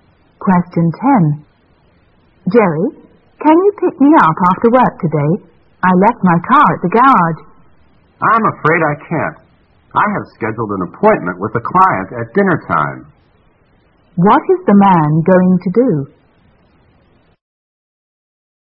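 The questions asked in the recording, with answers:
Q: What is the man going to do?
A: Meet a client at dinner time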